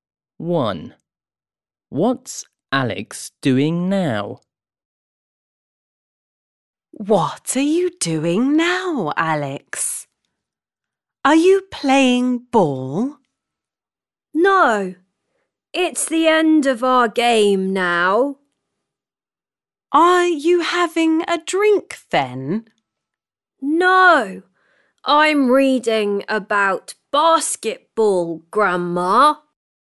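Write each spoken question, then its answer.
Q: What's Alex doing now?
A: reading about basketball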